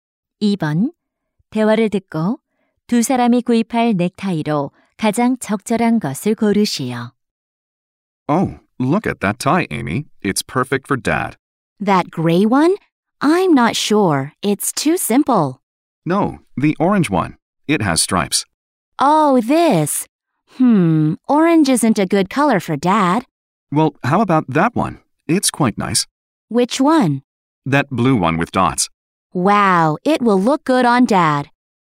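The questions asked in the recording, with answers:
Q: 대화를 듣고 두 사람이 구입할 넥타이로 가장 적절한 것을 고르시오.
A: 물방울 무늬가 있는 파란색 넥타이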